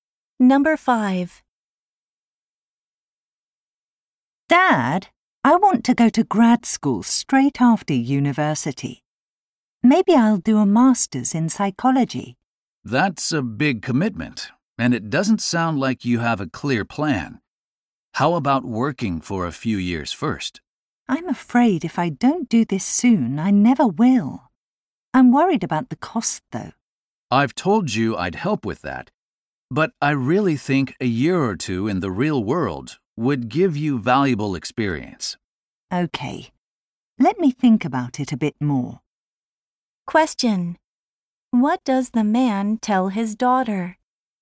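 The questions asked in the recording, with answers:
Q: What does the man tell his daughter?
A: She should work for a year or two before grad school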